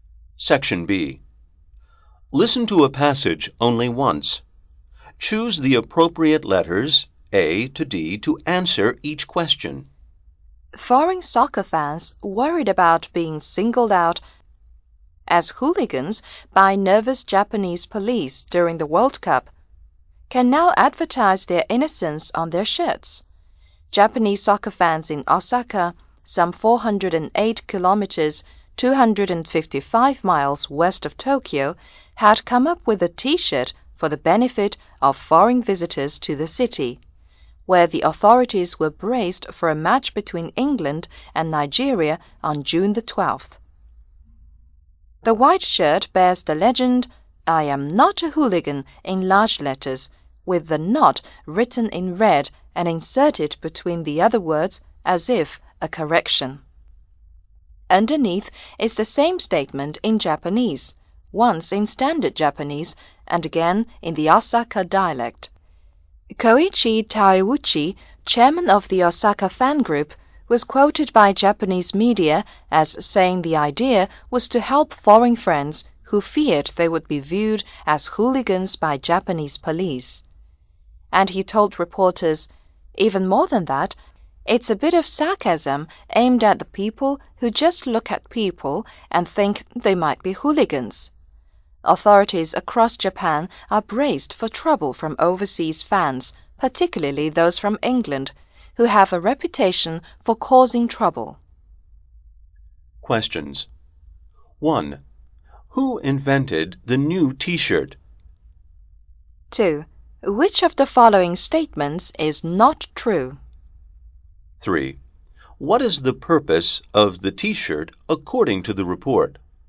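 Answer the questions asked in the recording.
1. Japanese soccer fans in Osaka
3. To help foreign fans avoid being seen as hooligans by the police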